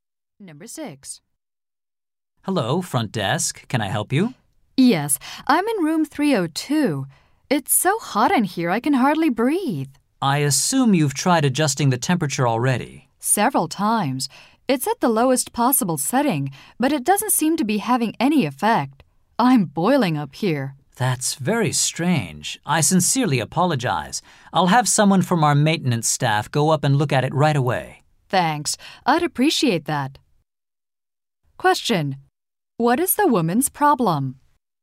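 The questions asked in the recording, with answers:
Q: What is the woman's problem?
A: Her room is too hot and the temperature control doesn't work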